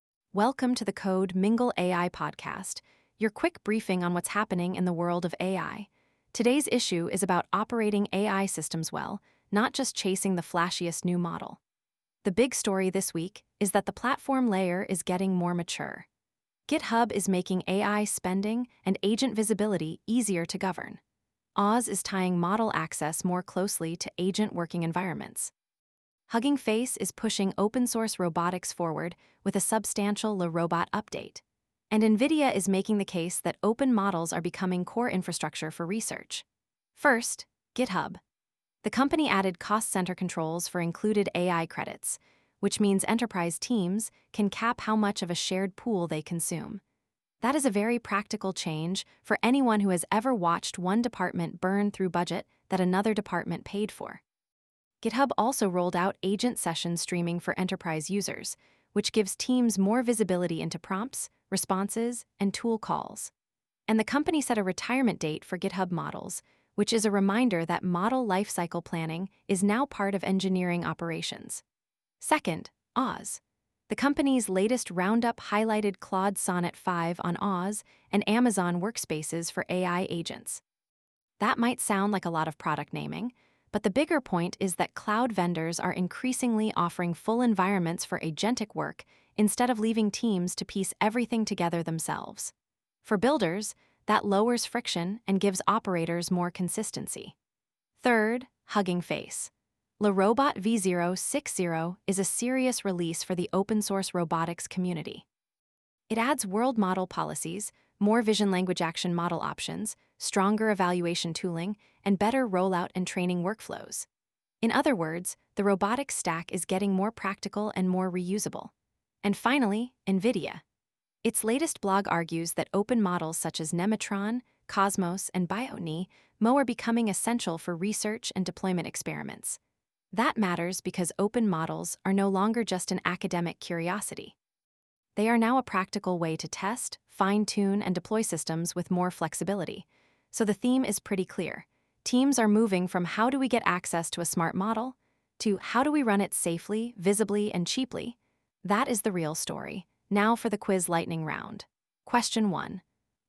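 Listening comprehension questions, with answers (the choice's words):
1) What is the main practical change GitHub introduced for enterprise AI spend?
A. A new browser-based IDE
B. Cost-center AI credit pools that cap included usage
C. A free local model runtime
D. A full replacement for GitHub Actions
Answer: Cost-center AI credit pools that cap included usage

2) Why is GitHub's agent session streaming feature important?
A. It removes the need for any logging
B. It gives enterprises visibility into prompts, responses, and tool calls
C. It guarantees lower model latency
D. It replaces every model provider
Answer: It gives enterprises visibility into prompts, responses, and tool calls

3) Why does Hugging Face's LeRobot v0.6.0 matter to developers?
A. It only supports desktop-only robotics demos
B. It adds world-model policies, new VLAs, and stronger evaluation tooling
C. It ships a new cloud-only chip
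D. It removes the need for datasets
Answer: It adds world-model policies, new VLAs, and stronger evaluation tooling

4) What does AWS's July 6 roundup suggest about enterprise AI strategy?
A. Every team should build custom agents from scratch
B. Managed model access and agent workspaces are becoming a more complete operating layer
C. Cloud providers are abandoning model hosting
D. Only open-source models are worth evaluating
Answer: Managed model access and agent workspaces are becoming a more complete operating layer

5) What is the main takeaway from NVIDIA's open-models message?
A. Open models are mainly a marketing term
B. Open models are becoming practical infrastructure for research and deployment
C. Open models are only useful for academic labs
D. Open models remove the need for any evaluation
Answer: Open models are becoming practical infrastructure for research and deployment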